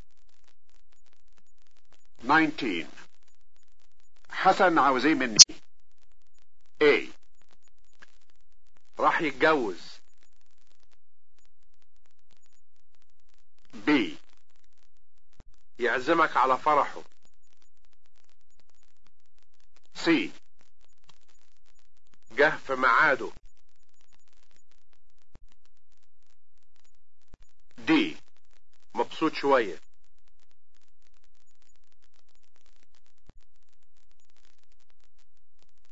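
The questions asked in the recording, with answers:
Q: حسن عاوز ايه مني؟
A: B: يعزمك على فرحه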